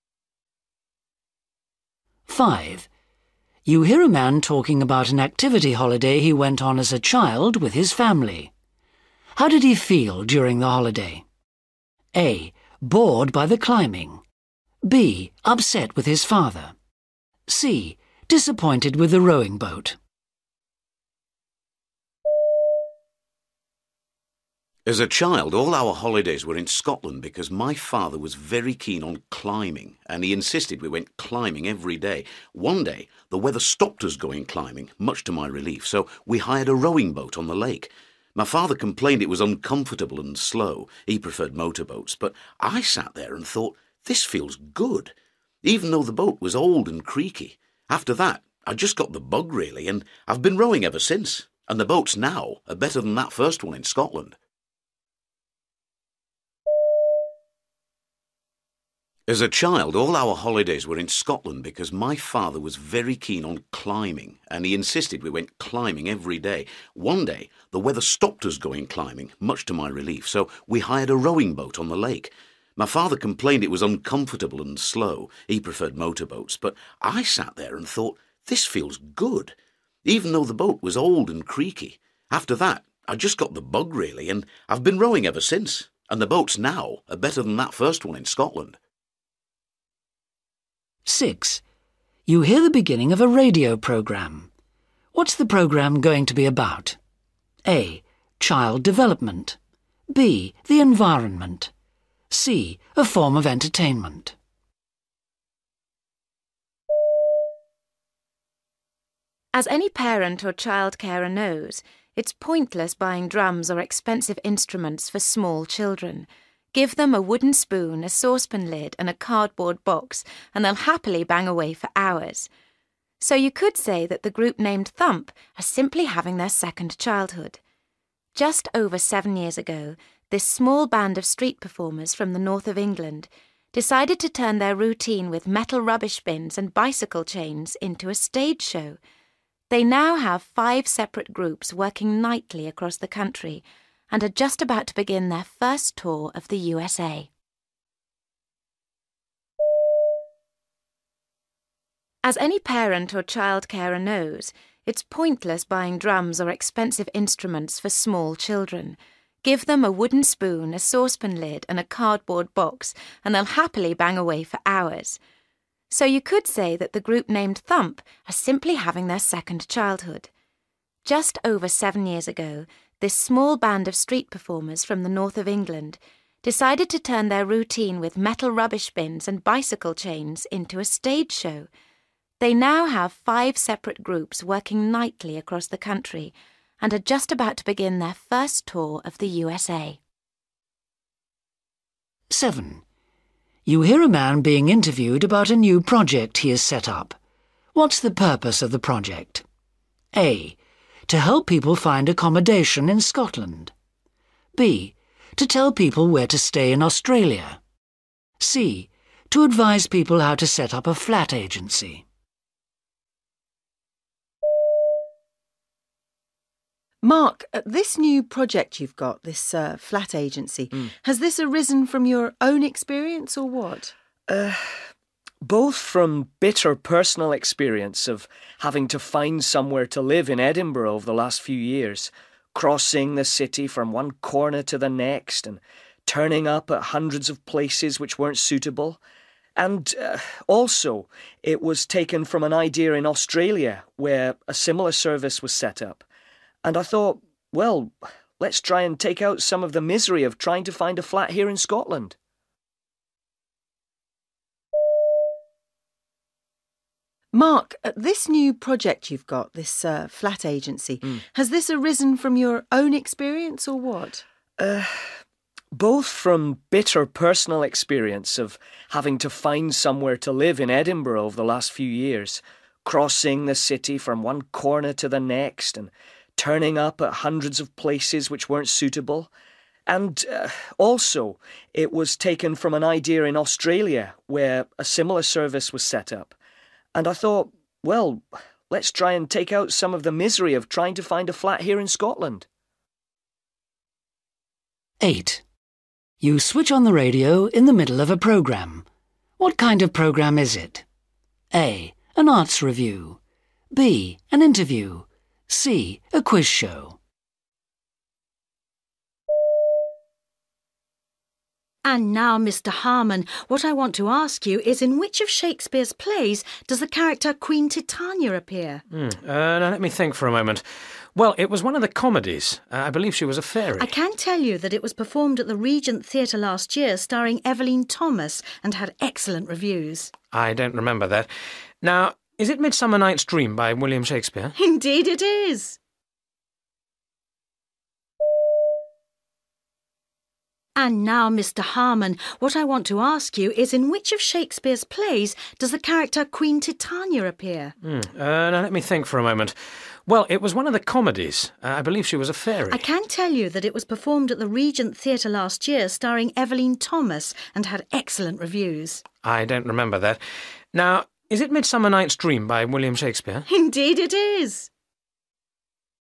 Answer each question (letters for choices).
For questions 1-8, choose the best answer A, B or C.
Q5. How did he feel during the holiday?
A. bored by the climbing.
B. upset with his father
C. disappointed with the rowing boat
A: A

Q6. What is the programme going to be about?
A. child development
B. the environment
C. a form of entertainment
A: C

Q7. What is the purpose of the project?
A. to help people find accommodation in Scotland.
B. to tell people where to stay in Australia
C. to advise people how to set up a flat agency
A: A

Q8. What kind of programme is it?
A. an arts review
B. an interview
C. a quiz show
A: C